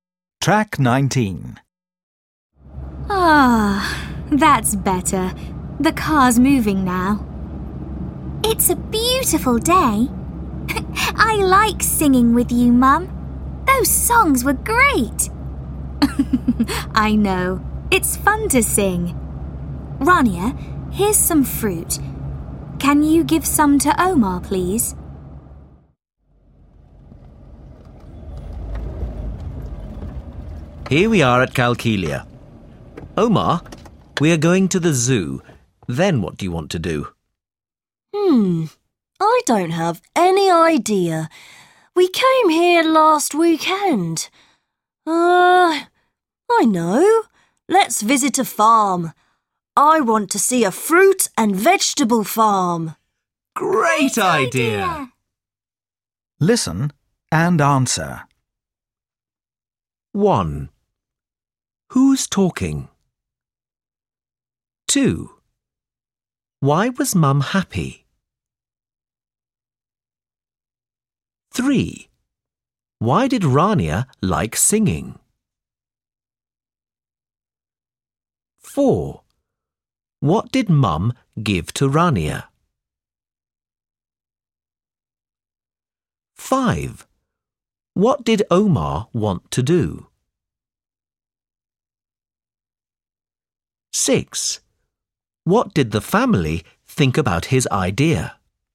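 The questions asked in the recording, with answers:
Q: What did Mum give to Rania?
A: Some fruit

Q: What did the family think about his idea?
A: It was a great idea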